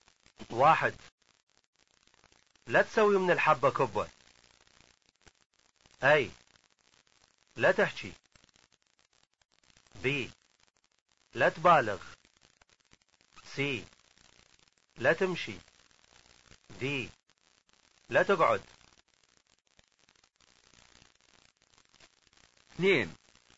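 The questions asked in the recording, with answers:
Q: لا تسوي من الحبة كبة.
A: B: لا تبالغ.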